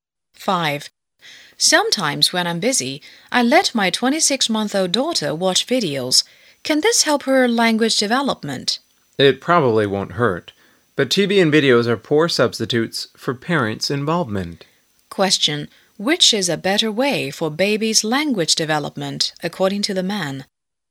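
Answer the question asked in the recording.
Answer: Parents' involvement with the child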